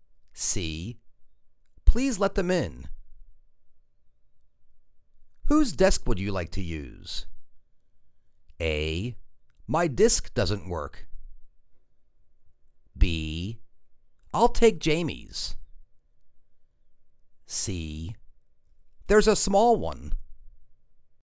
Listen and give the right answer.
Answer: I'll take Jamie's.